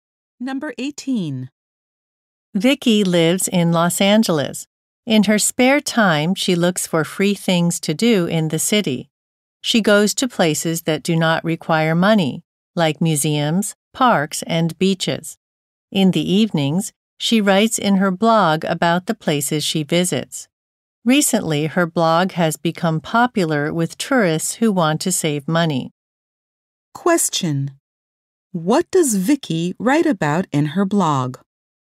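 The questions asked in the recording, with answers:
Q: What does Vicky write about in her blog?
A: Free places she visits in the city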